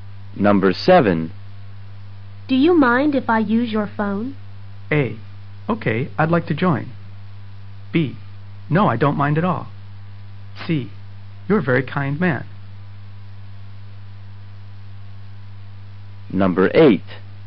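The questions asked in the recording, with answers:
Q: Do you mind if I use your phone?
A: B: No, I don't mind at all.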